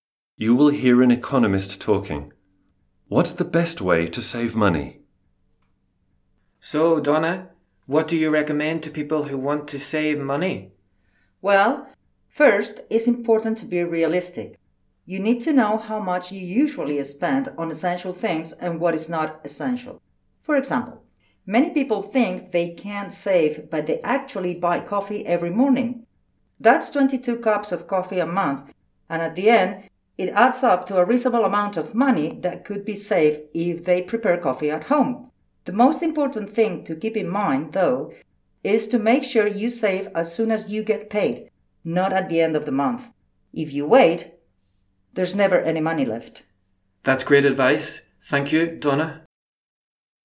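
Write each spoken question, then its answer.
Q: What's the best way to save money?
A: Save as soon as you get paid, not at the end of the month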